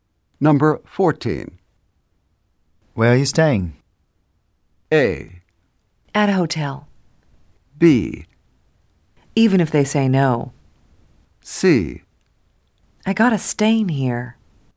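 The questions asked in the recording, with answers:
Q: Where are you staying?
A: A: At a hotel.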